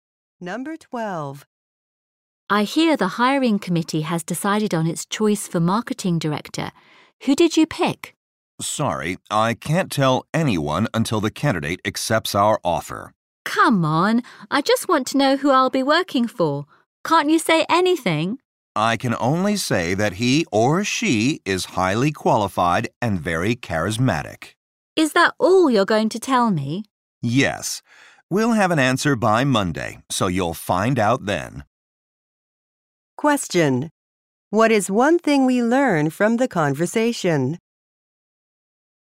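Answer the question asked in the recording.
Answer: The candidate has not accepted the offer yet; the decision will be known by Monday.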